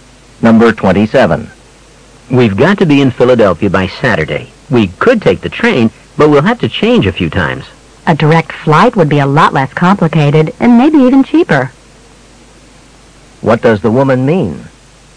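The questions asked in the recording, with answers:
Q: What does the woman mean?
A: They should fly directly instead of taking the train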